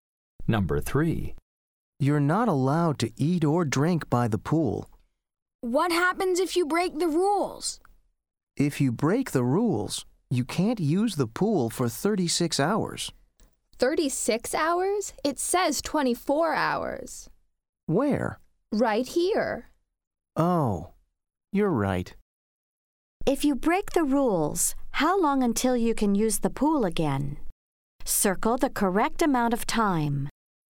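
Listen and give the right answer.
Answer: 24 hours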